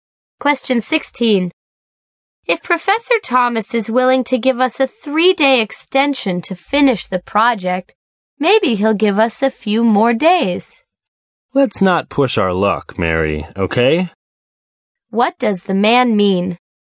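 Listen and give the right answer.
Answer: They shouldn't ask the professor for more time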